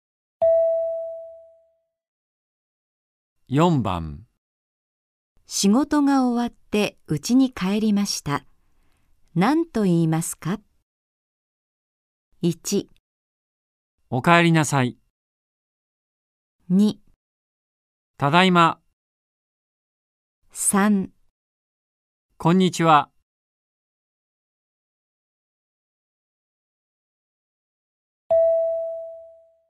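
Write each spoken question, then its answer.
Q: 仕事が終わって家に帰りました。何と言いますか?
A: 2: ただいま。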